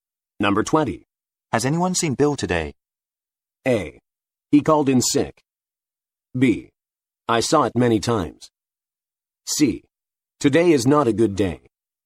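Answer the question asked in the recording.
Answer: A: He called in sick.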